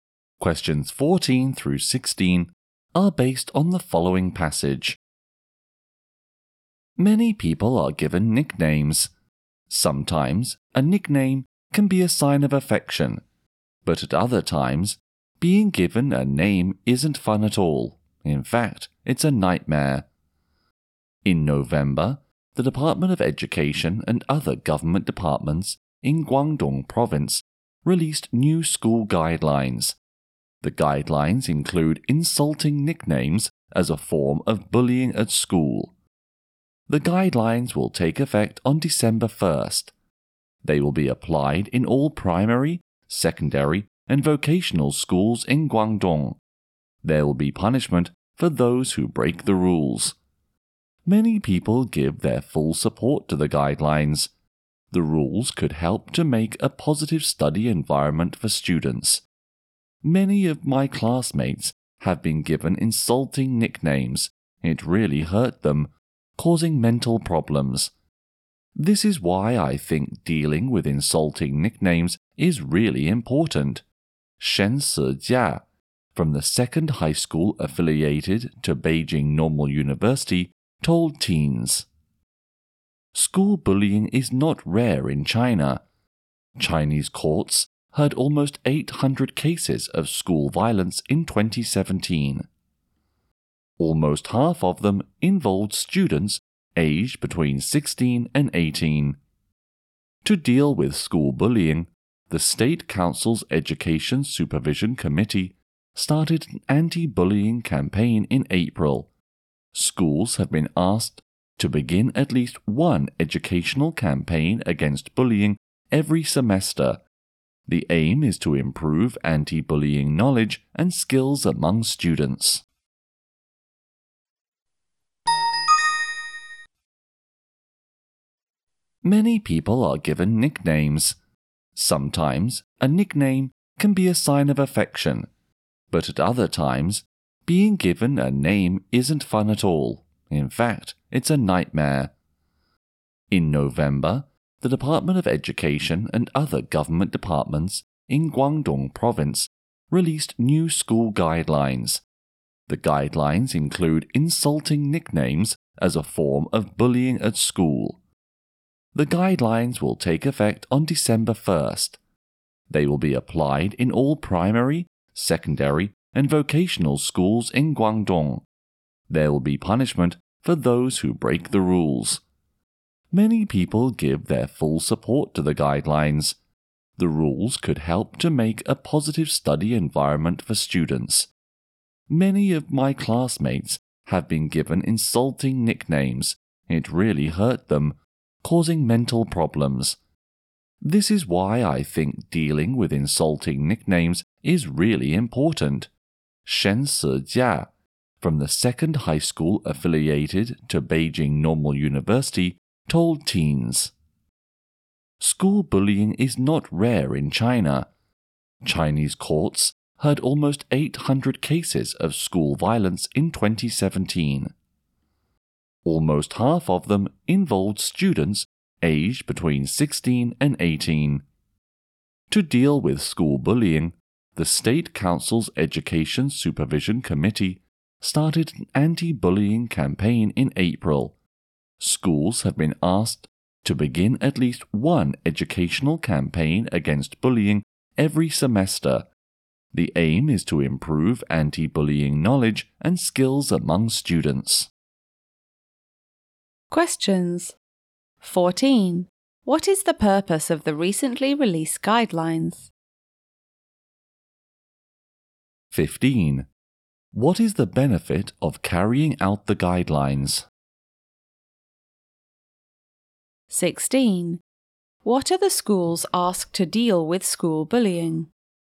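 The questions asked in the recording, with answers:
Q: What is the purpose of the recently released guidelines?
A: To stop insulting nicknames as school bullying.

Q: What is the benefit of carrying out the guidelines?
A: A positive study environment for students.

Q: What are the schools asked to deal with school bullying?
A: Hold at least one anti-bullying educational campaign every semester.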